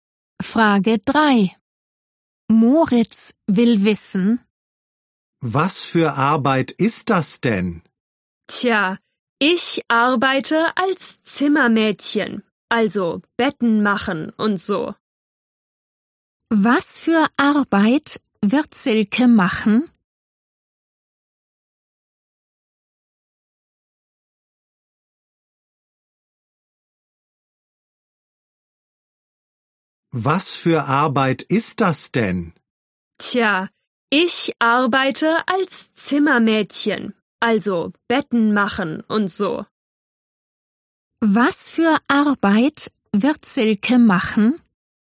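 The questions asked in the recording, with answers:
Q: Was für Arbeit wird Silke machen?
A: Sie arbeitet als Zimmermädchen (Betten machen)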